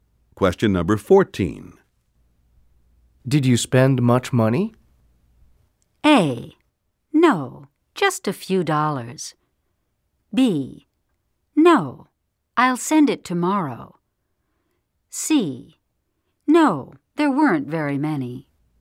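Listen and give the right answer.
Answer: A: No, just a few dollars.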